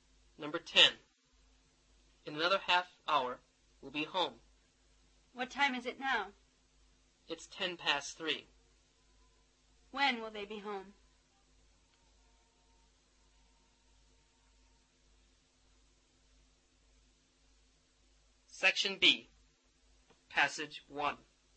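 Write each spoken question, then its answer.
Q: When will they be home?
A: At 3:40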